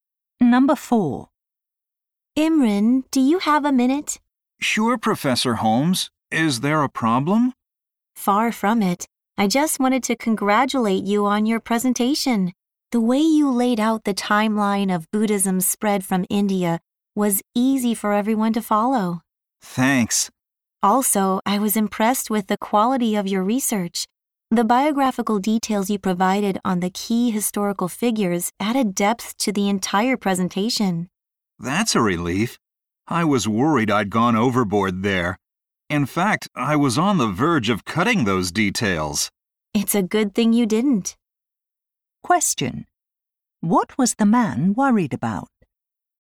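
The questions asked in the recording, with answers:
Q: What was the man worried about?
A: That he had included too many biographical details in his presentation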